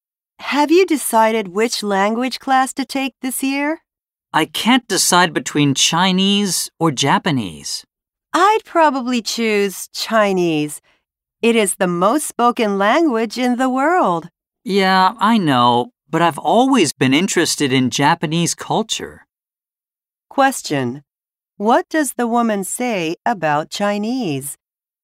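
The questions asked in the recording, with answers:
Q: What does the woman say about Chinese?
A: It is the most spoken language in the world.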